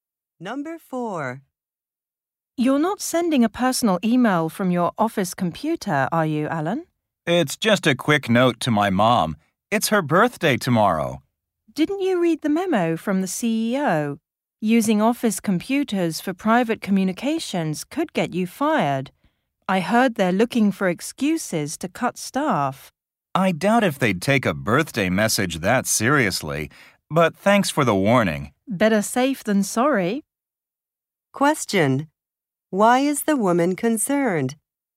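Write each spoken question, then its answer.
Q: Why is the woman concerned?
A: Alan could get fired for sending personal email from an office computer.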